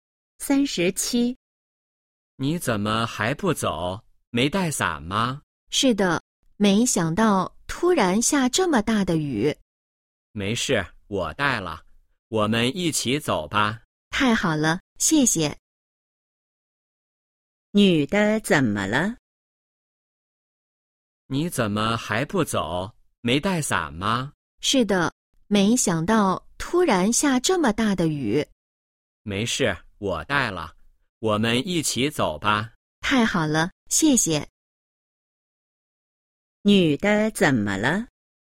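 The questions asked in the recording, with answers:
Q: 女的怎么了?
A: 没带伞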